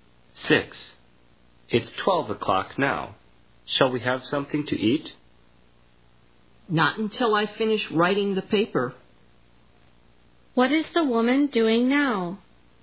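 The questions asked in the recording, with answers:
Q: What is the woman doing now?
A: Writing a paper.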